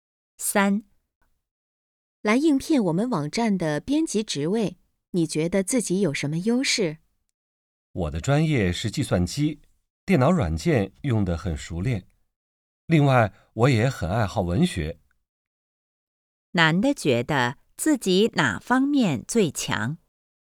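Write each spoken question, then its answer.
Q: 男的觉得自己哪方面最强?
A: 电脑软件用得很熟练(计算机)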